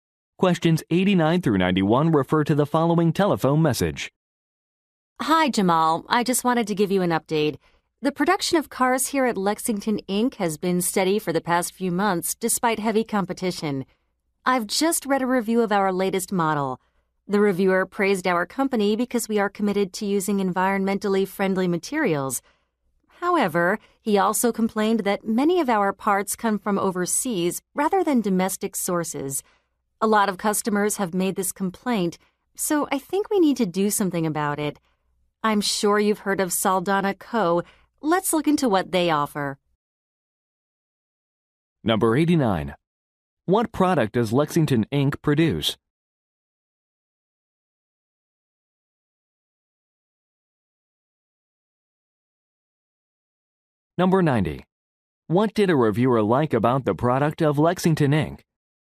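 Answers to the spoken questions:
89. Cars
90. It uses environmentally friendly materials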